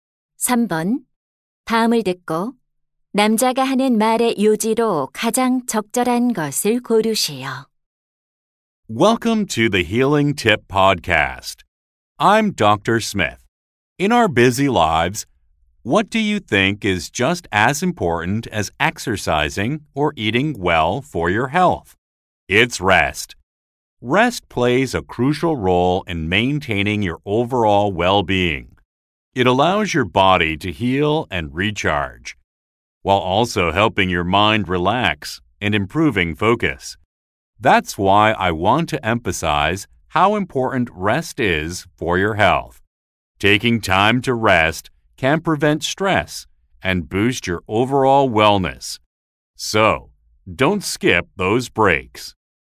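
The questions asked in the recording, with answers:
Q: 다음을 듣고 남자가 하는 말의 요지로 가장 적절한 것을 고르세요.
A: 휴식은 건강에 중요하다.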